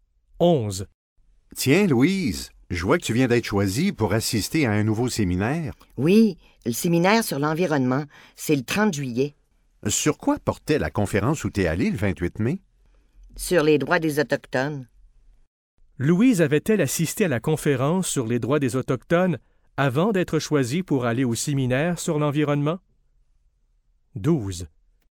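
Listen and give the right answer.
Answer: Oui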